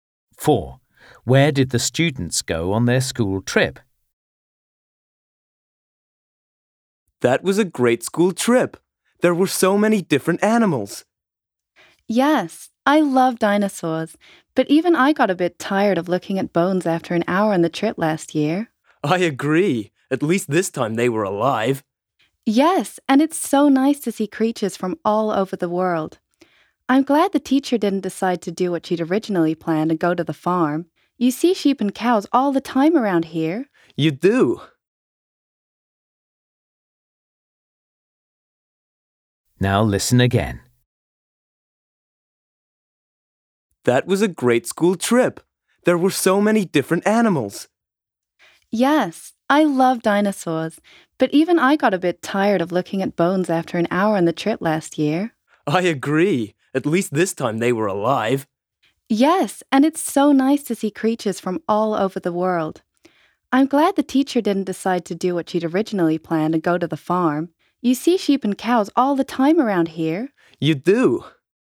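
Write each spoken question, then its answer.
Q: Where did the students go on their school trip?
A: the zoo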